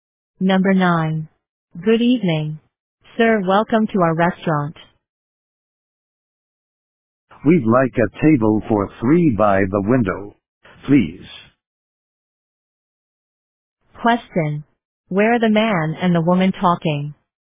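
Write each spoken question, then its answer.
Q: Question. Where are the man and the woman talking?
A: In a restaurant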